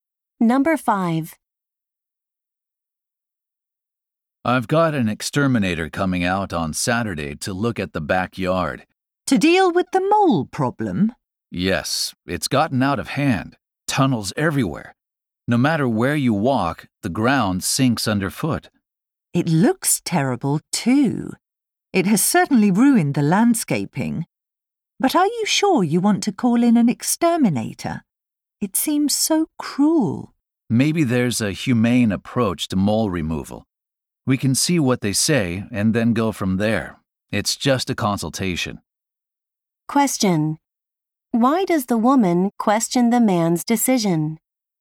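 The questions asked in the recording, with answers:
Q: Why does the woman question the man's decision?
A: She thinks killing the moles is cruel and wants a humane way.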